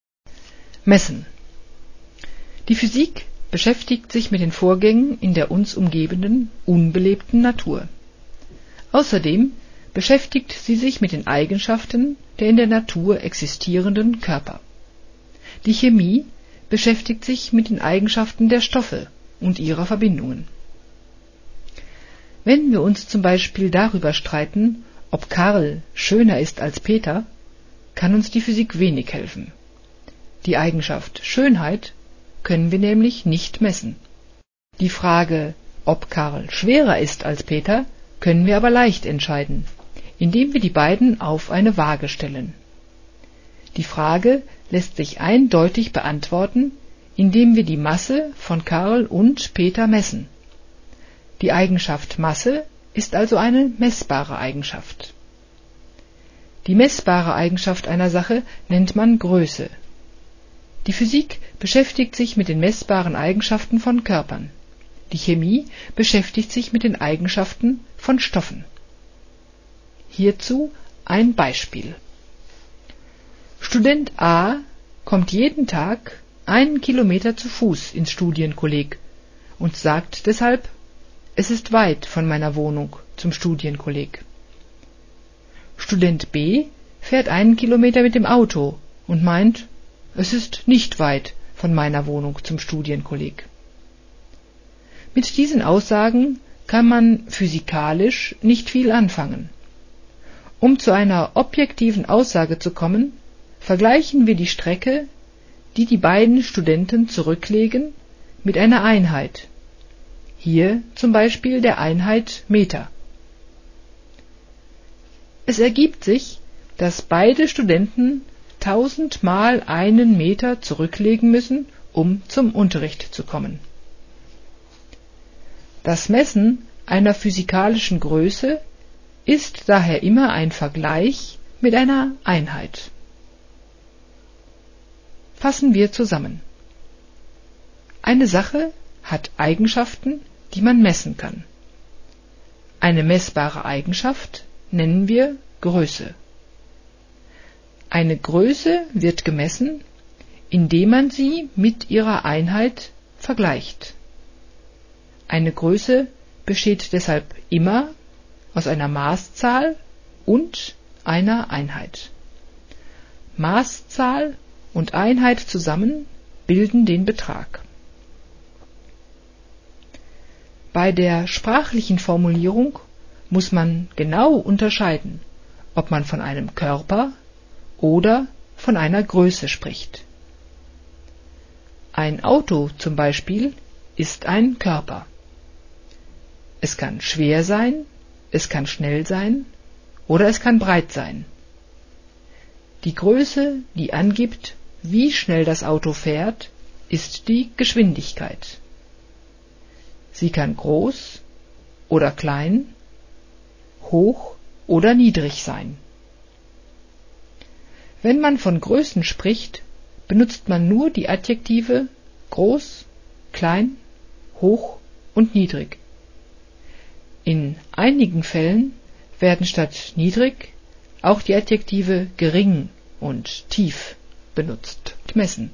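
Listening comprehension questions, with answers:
1. Steht das sinngemäß im Text? (ja / nein)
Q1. Die Physik beschäftigt sich mit Lebewesen.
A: nein

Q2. Die Physik beschäftigt sich mit der unbelebten Natur.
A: ja

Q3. Die Physik beschäftigt sich mit den Eigenschaften der Körper.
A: ja

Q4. Schönheit ist eine messbare Eigenschaft.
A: nein

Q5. Karl ist schöner als Peter.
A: nein

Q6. Man kann nicht messen, was schön ist.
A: ja

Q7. Gewicht ist eine messbare Eigenschaft.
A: ja

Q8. Es ist nicht messbar, wie schwer eine Sache ist.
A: nein

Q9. Eine Größe ist eine meßbare Eigenschaft.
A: ja

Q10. Student A hat einen weiteren Weg als Student B.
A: nein

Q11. Die Aussage:"Es ist weit zum Kolleg." lässt sich nicht eindeutig überprüfen.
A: ja

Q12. Messen bedeutet Vergleichen mit einer Einheit.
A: ja

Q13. Eine Einheit für Strecken ist die Einheit Meter (m).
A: ja

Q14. Wir vergleichen die Strecke, die die Studenten zurücklegen, tausend mal mit der Einheit Meter.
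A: ja

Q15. Ein Auto kann schnell sein.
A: ja

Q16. Die Geschwindigkeit kann schnell sein.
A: nein

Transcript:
Messen
Die Physik beschäftigt sich mit den Vorgängen in der uns umgebenden unbelebten Natur. Außerdem beschäftigt sie sich mit den Eigenschaften der in der Natur existierenden Körper1. Die Chemie beschäftigt sich mit den Eigenschaften der Stoffe2 und ihrer Verbindungen.
Wenn wir uns z.B. darüber streiten, ob Karl schöner ist als Peter, kann uns die Physik wenig helfen. Die Eigenschaft "Schönheit" können wir nämlich nicht messen.
Die Frage, ob Karl schwerer ist als Peter, können wir aber leicht entscheiden, indem wir die beiden auf eine Waage stellen. Die Frage lässt sich eindeutig beantworten, indem wir die Masse von Karl und Peter messen. Die Eigenschaft "Masse" ist also eine messbare Eigenschaft. Die messbare Eigenschaft einer Sache nennt man Größe.
Student A kommt jeden Tag 1 km zu Fuß ins Studienkolleg und sagt deshalb: "Es ist weit von meiner Wohnung zum Studienkolleg." Student B fährt 1 km mit dem Auto und meint "Es ist nicht weit von meiner Wohnung zum Studienkolleg." Mit diesen Aussagen kann man physikalisch nicht viel anfangen. 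Um zu einer objektiven Aussage zu kommen, vergleichen wir die Strecke, die die beiden Studenten zurücklegen, mit einer Einheit, hier z.B. der Einheit Meter (m). Es ergibt sich, dass beide Studenten 1000 mal einen Meter zurücklegen müssen, um zum Unterricht zu kommen.
Das Messen einer physikalischen Größe ist daher immer ein Vergleich mit einer Einheit.
Fassen wir zusammen: Eine Sache hat Eigenschaften, die man messen kann. Eine messbare Eigenschaft nennen wir Größe. Eine Größe wird gemessen, indem man sie mit ihrer Einheit vergleicht. Eine Größe besteht deshalb immer aus einer Maßzahl und einer Einheit. Maßzahl und Einheit zusammen bilden den Betrag.
Bei der sprachlichen Formulierung muss man genau unterscheiden, ob man von einem Körper oder von einer Größe spricht. Ein Auto z.B. ist ein Körper. Es kann schwer sein, es kann schnell sein oder es kann breit sein. Die Größe, die angibt, wie schnell das Auto fährt, ist die Geschwindigkeit. 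Sie kann groß oder klein, hoch oder niedrig sein. Wenn man von Größen spricht, benutzt man nur die Adjektive "groß,klein,hoch und niedrig". In einigen Fällen werden statt "niedrig" auch die Adjektive "gering" und "tief" benutzt.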